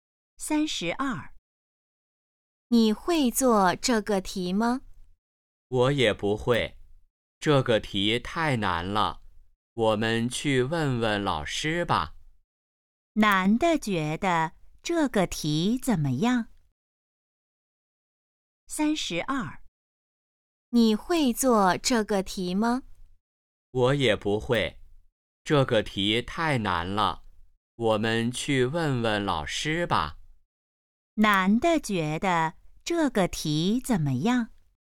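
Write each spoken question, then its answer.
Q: 男的觉得这个题怎么样?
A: 太难了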